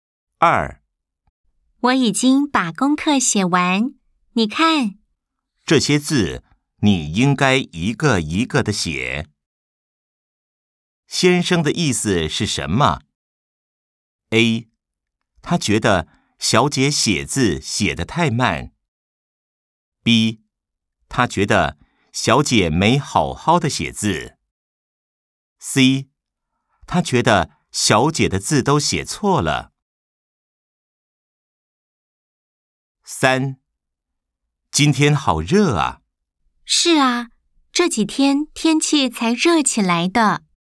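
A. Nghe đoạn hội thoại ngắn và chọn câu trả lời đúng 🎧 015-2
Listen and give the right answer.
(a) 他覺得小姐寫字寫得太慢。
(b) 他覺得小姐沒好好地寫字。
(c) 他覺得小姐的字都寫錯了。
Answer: (b) 他覺得小姐沒好好地寫字。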